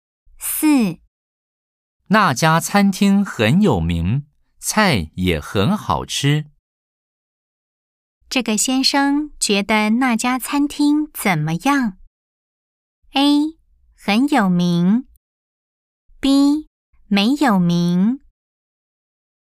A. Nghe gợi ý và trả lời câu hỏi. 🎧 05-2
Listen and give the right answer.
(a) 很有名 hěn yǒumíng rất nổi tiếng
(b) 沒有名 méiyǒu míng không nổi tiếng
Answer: (a) 很有名 hěn yǒumíng rất nổi tiếng